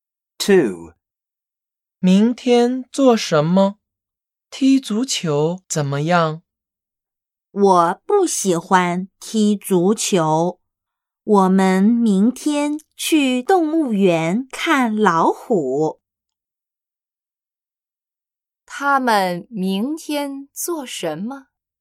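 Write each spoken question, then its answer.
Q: 他们明天做什么?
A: 去动物园看老虎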